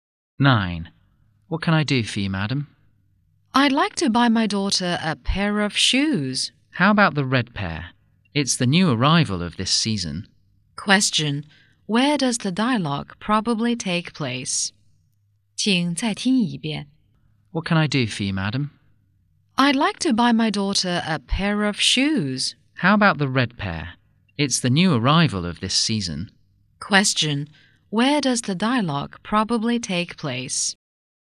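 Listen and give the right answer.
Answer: In a shoe shop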